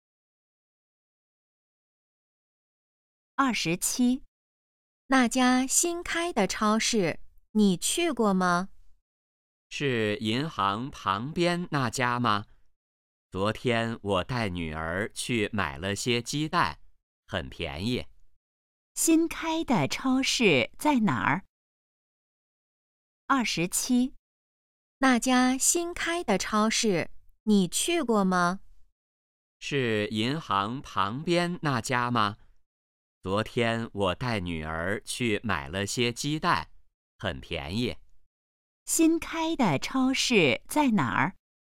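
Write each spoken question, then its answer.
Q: 新开的超市在哪儿?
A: 银行旁边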